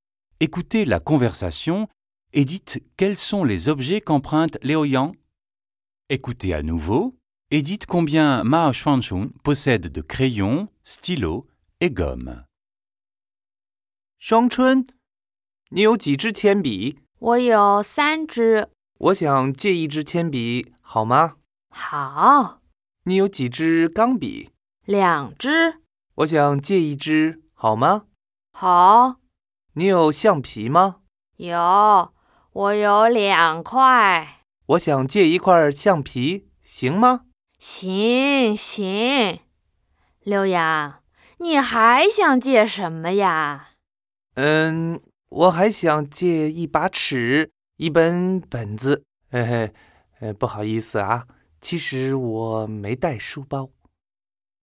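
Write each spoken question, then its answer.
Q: Écoutez la conversation et dites quels sont les objets qu'emprunte Léo Yang.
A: un crayon, un stylo, une gomme, une règle et un cahier

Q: Écoutez à nouveau et dites combien Mao Xuanchun possède de crayons, stylos et gommes.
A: 3 crayons, 2 stylos, 2 gommes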